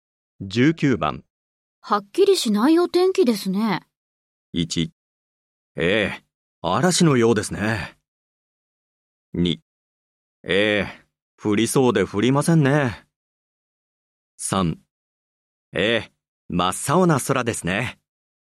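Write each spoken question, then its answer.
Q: はっきりしないお天気ですね。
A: 2: ええ、降りそうで降りませんね。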